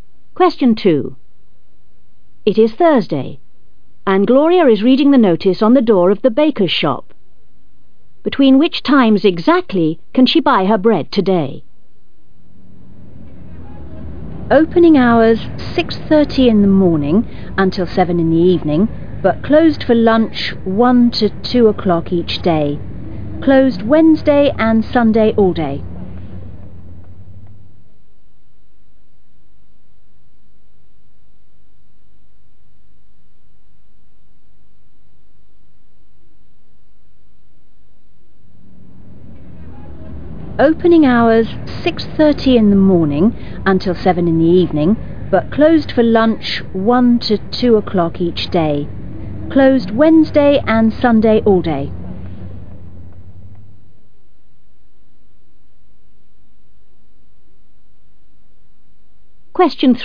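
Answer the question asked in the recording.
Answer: 6:30 a.m. to 1 p.m. and 2 p.m. to 7 p.m.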